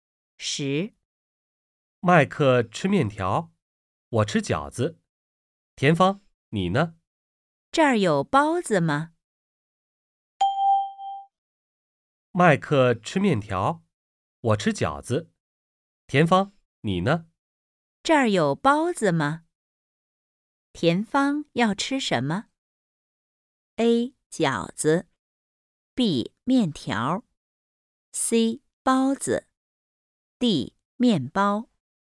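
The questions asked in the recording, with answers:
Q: 田芳要吃什么?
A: C: 包子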